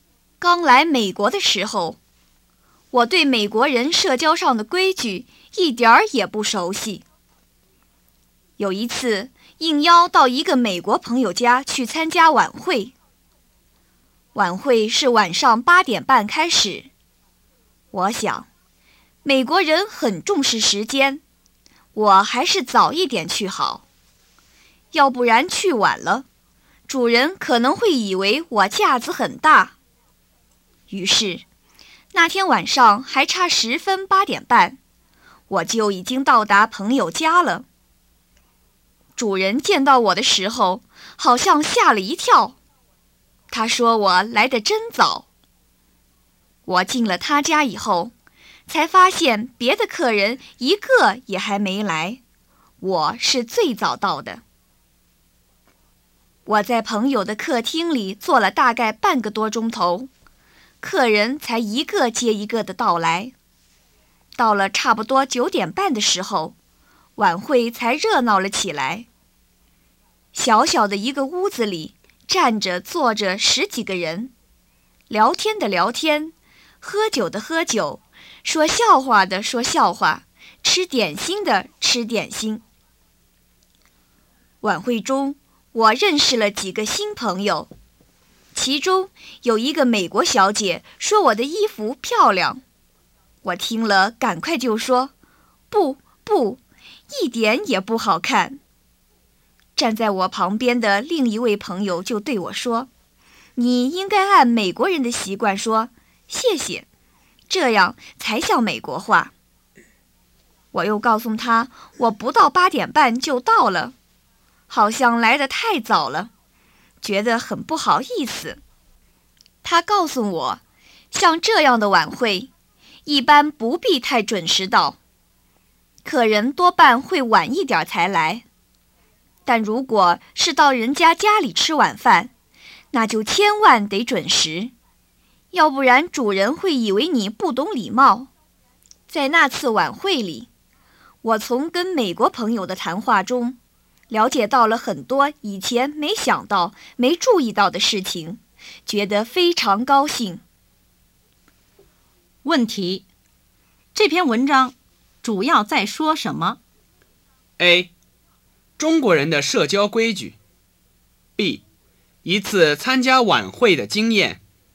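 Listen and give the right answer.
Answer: B: 一次参加晚会的经验。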